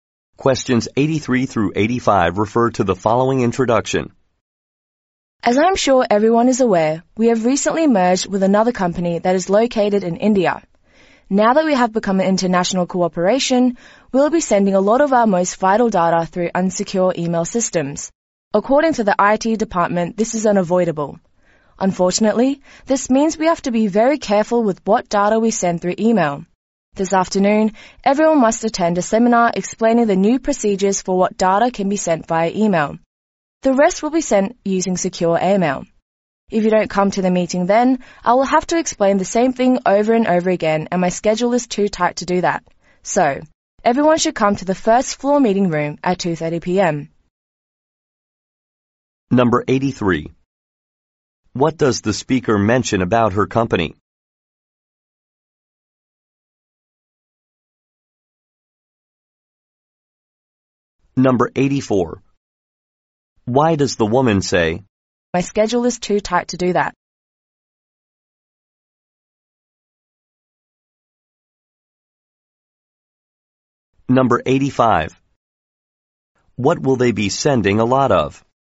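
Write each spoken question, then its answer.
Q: What does the speaker mention about her company?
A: It recently merged with a company in India.

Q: What will they be sending a lot of?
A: Vital data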